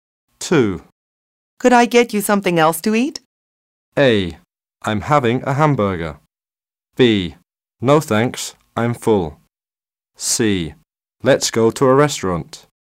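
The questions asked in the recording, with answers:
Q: Could I get you something else to eat?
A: B: No thanks, I'm full.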